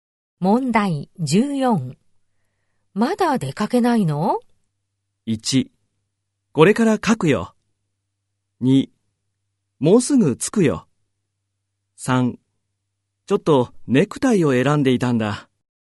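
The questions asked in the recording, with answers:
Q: まだ出かけないの?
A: 3: ちょっとネクタイを選んでいたんだ。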